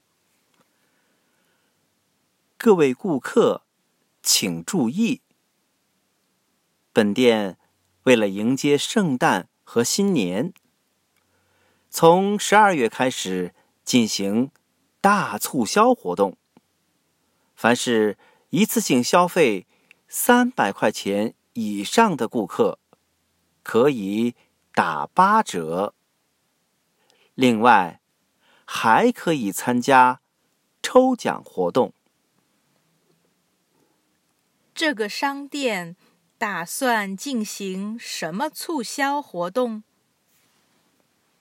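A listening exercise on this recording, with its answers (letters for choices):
Listen to the audio texts and questions, tick ONE correct answer to each question.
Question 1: What promotion strategies is the shop engaging?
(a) Lucky draw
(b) 80% discount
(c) Both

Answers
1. c

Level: Upper Intermediate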